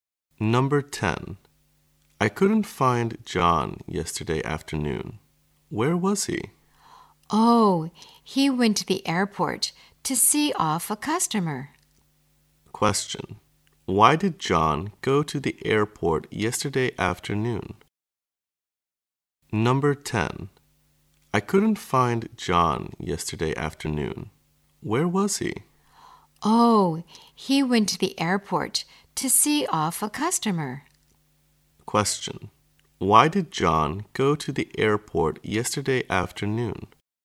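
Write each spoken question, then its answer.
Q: why did John go to the airport yesterday afternoon?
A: To see off a customer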